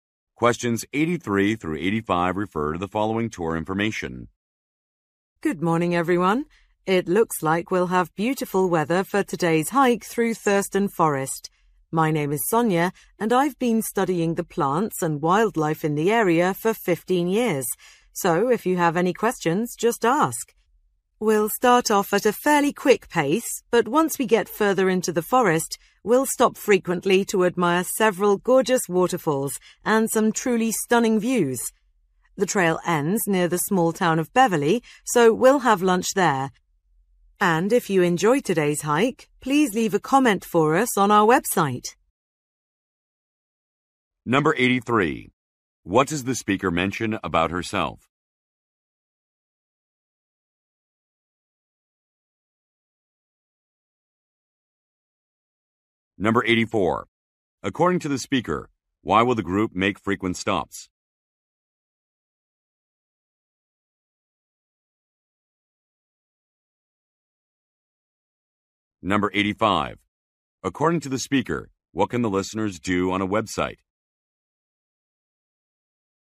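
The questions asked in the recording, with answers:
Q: What does the speaker mention about herself?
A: She has studied the area's plants and wildlife for 15 years

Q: According to the speaker, why will the group make frequent stops?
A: To admire waterfalls and views

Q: According to the speaker, what can the listeners do on a website?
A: Leave a comment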